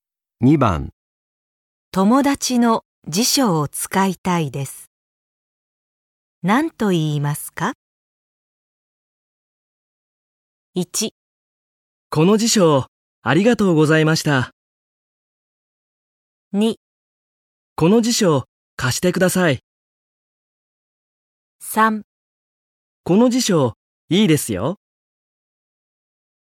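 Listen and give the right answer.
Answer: 2: この辞書貸してください。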